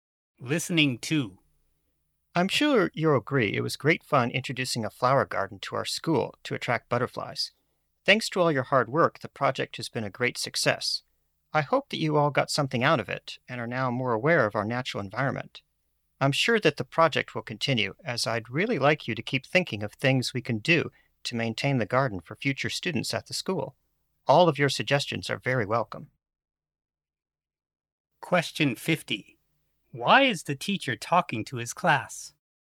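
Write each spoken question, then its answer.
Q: Why is the teacher talking to his class?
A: To thank them for their work on the butterfly flower garden project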